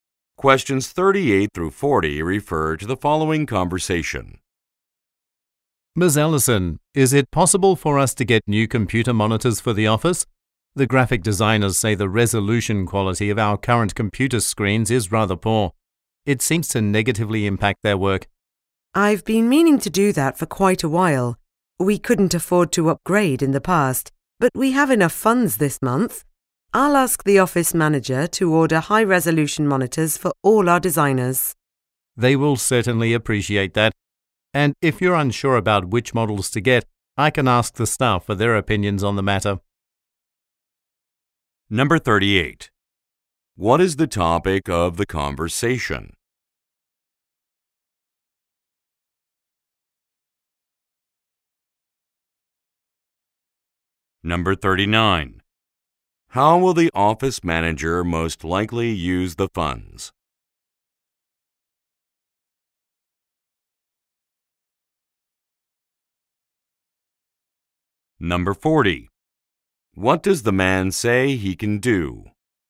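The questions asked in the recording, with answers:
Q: What is the topic of the conversation?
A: Getting new computer monitors

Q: How will the office manager most likely use the funds?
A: To order high-resolution monitors

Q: What does the man say he can do?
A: Ask the staff for their opinions on models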